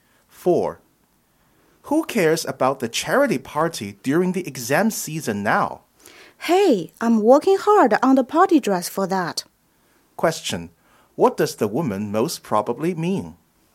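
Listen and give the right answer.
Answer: She cares about the party and is preparing for it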